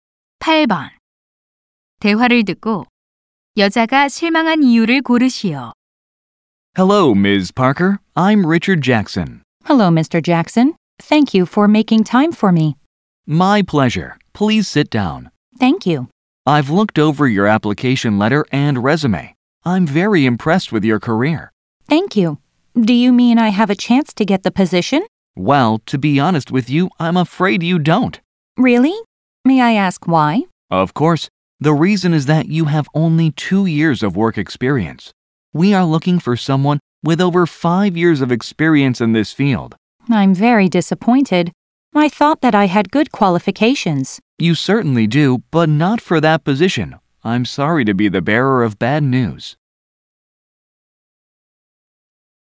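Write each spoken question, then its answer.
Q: 대화를 듣고 여자가 실망한 이유를 고르시오.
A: 경력이 부족해 그 직위에 채용될 수 없어서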